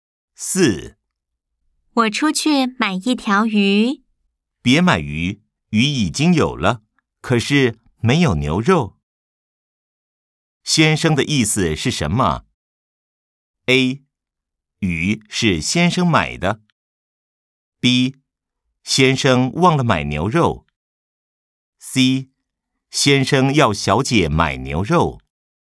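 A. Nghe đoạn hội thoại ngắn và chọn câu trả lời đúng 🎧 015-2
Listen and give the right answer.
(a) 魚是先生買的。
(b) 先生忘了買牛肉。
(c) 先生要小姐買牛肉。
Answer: (c) 先生要小姐買牛肉。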